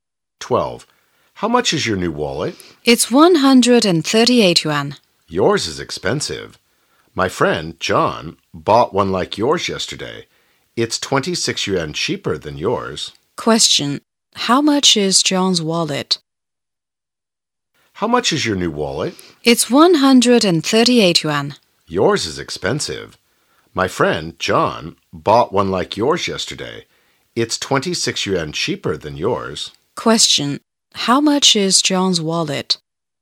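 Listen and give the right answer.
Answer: 112 yuan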